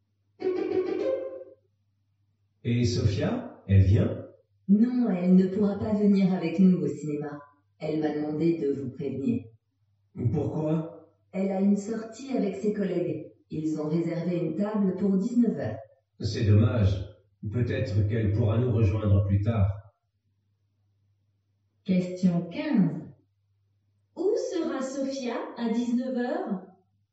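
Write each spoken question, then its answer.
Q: Où sera Sophia à 19h ?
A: Au restaurant avec ses collègues.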